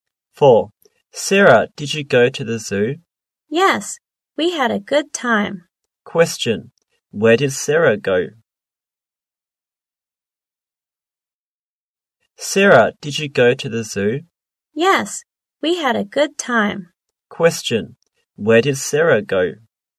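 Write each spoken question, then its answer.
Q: Where did Sarah go?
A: To the zoo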